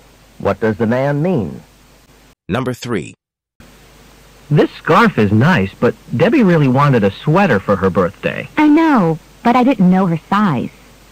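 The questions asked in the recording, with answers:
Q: What can be inferred from the conversation?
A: The man bought Debbie a scarf because he didn't know her size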